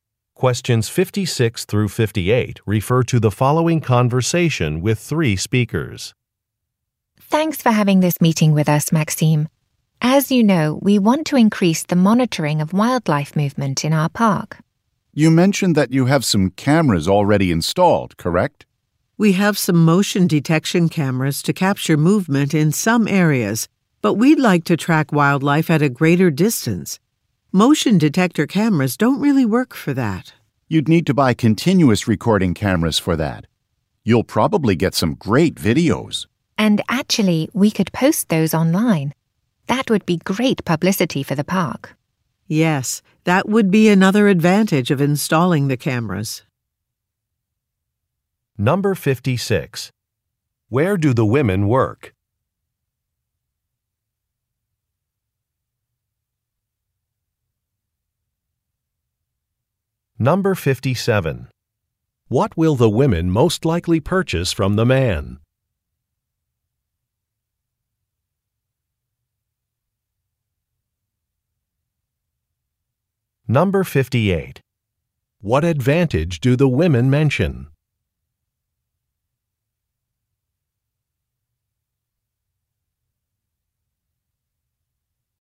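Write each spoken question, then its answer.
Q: Where do the women work?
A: At a park

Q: What will the women most likely purchase from the man?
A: Continuous recording cameras

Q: What advantage do the women mention?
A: Publicity for the park by posting videos online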